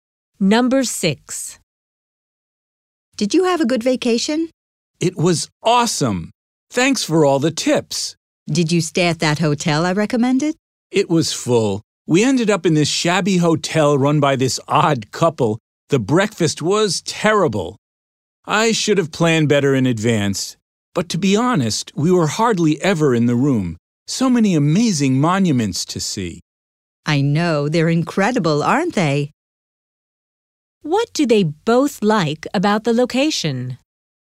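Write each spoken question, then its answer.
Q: What do they both like about the location?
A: The amazing monuments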